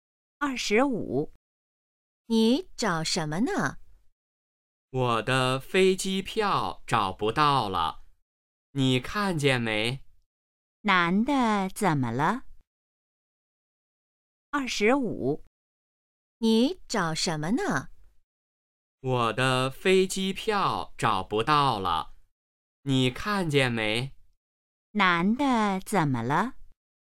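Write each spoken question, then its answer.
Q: 男的怎么了?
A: 飞机票找不到了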